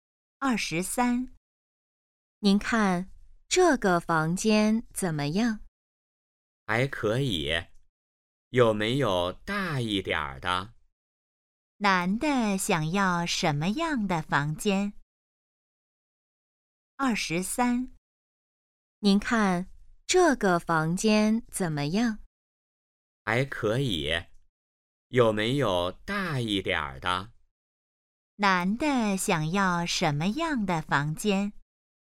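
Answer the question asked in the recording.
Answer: 大一点的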